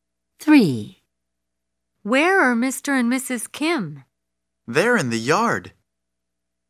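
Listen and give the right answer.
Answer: In the yard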